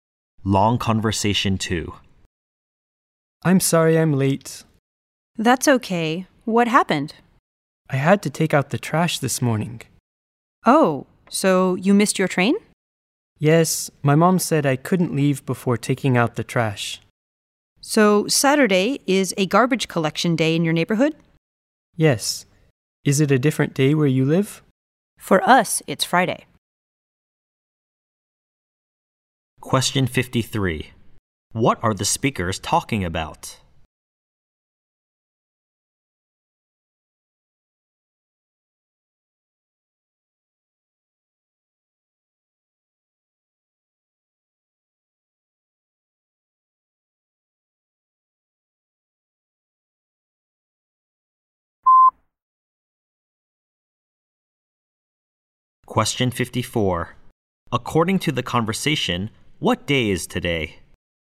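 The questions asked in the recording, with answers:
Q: What are the speakers talking about?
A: Why one speaker was late: taking out the trash on garbage collection day

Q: According to the conversation, what day is today?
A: Saturday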